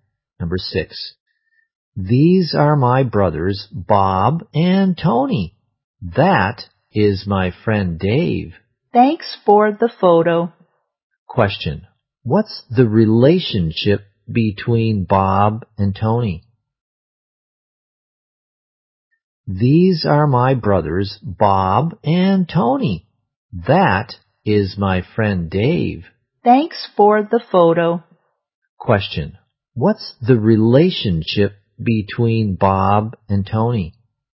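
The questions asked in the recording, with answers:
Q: what's the relationship between Bob and Tony?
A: They are brothers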